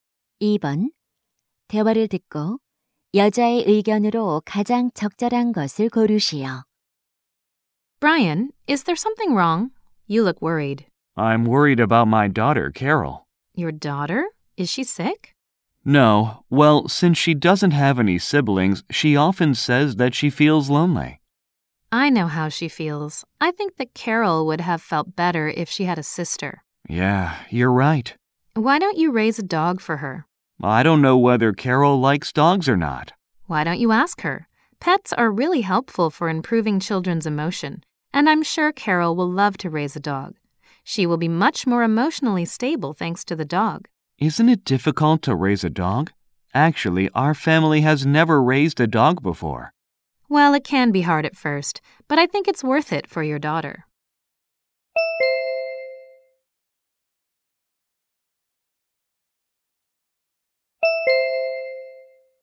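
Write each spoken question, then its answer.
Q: 대화를 듣고 여자의 의견으로 가장 적절한 것을 고르시오.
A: 반려동물(개)을 기르는 것은 아이의 정서 발달에 도움이 된다.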